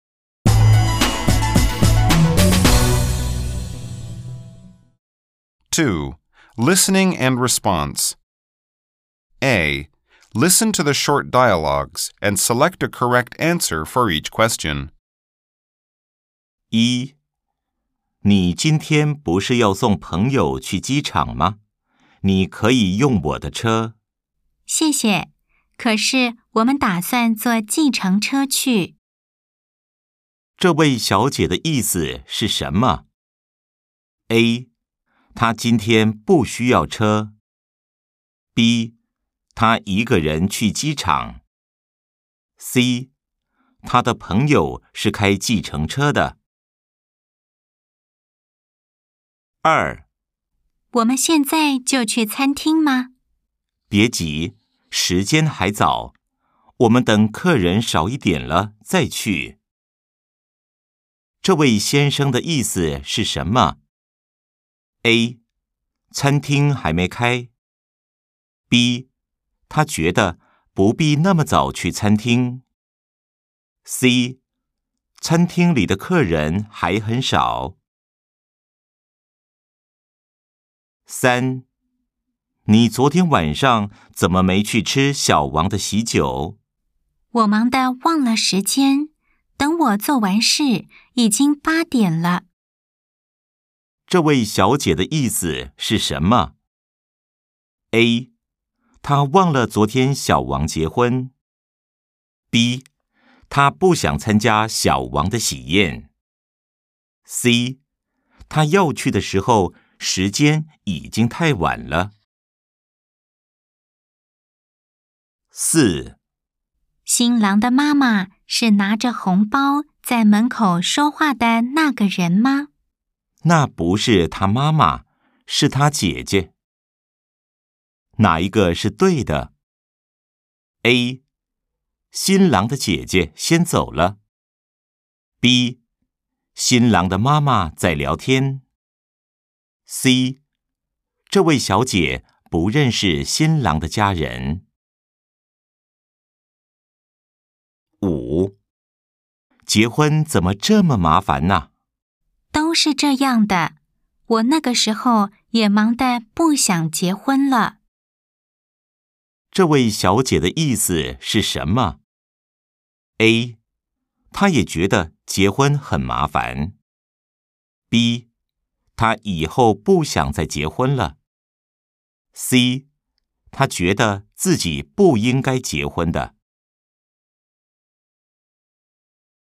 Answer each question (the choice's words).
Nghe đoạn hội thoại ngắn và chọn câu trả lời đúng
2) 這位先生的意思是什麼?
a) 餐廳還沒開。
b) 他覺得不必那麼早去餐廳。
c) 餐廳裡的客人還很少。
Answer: 他覺得不必那麼早去餐廳。

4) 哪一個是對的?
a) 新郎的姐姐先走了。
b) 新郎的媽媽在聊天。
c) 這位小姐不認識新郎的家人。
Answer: 這位小姐不認識新郎的家人。

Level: Đương Đại 2